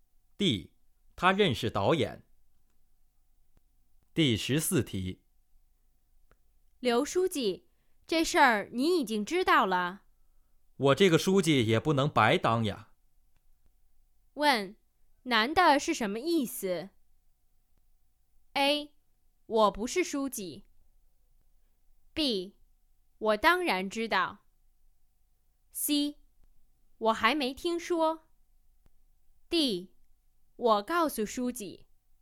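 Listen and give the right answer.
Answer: B: 我当然知道。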